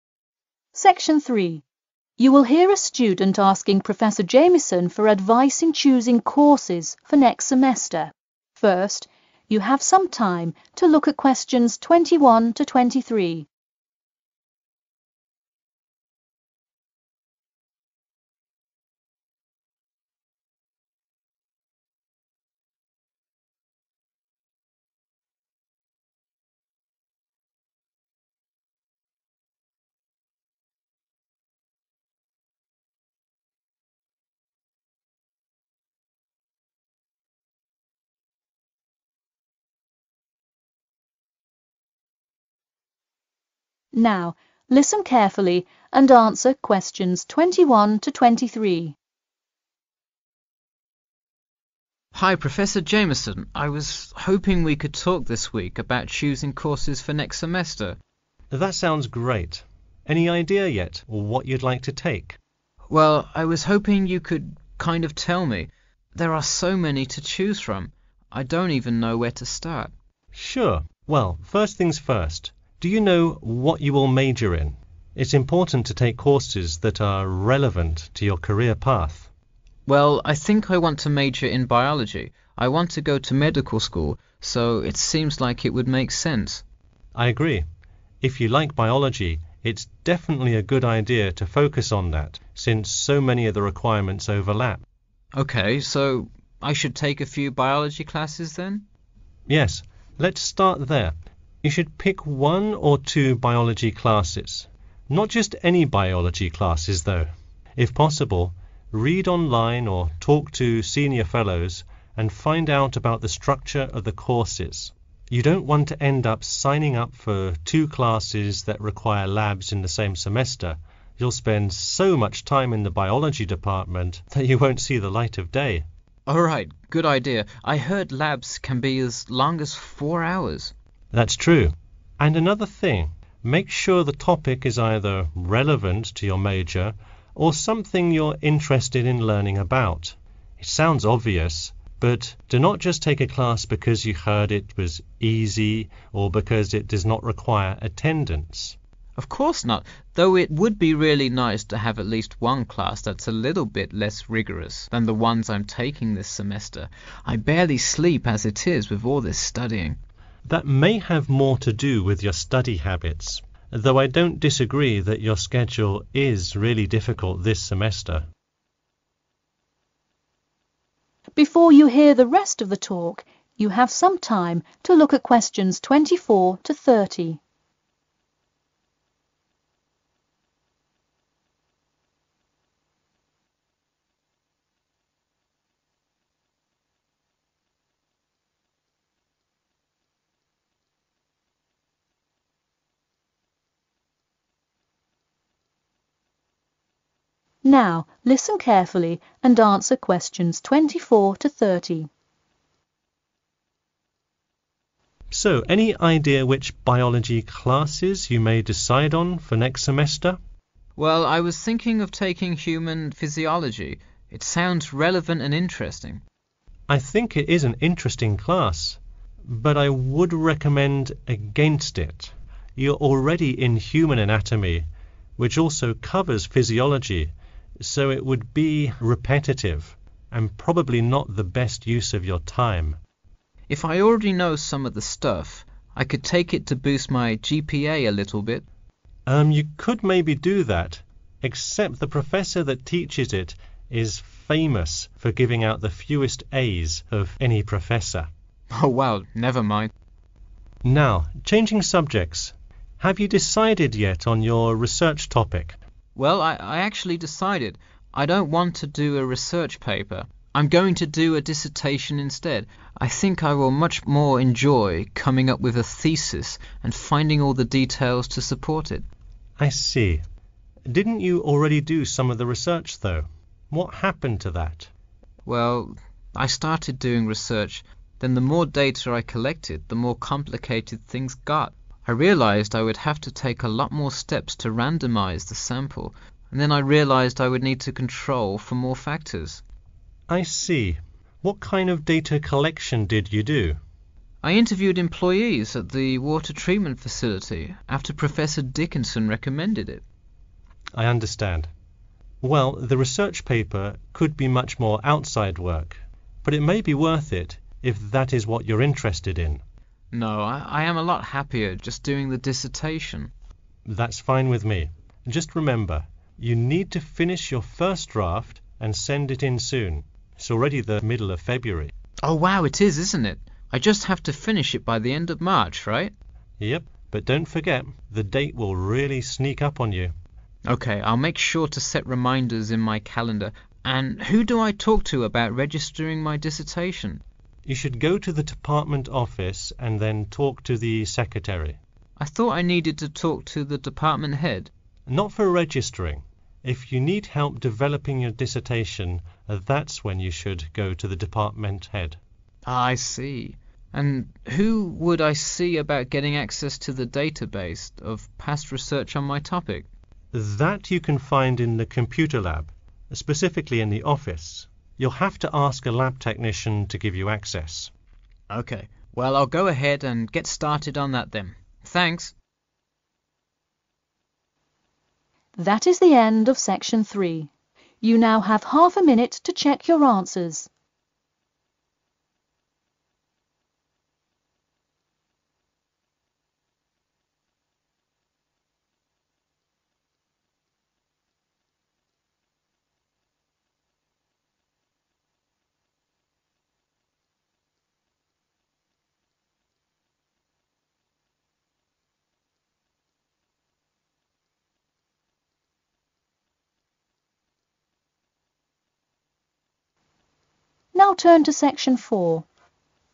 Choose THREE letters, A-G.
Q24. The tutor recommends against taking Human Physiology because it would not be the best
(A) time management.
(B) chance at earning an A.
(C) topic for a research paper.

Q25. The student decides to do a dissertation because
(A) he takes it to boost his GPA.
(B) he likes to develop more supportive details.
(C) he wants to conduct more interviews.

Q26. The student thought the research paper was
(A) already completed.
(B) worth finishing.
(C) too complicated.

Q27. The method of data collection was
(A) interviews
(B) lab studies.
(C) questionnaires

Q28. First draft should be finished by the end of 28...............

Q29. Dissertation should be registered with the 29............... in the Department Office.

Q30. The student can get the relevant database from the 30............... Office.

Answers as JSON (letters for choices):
{"24": "A", "25": "B", "26": "C", "27": "A", "28": "March", "29": "secretary", "30": "computer"}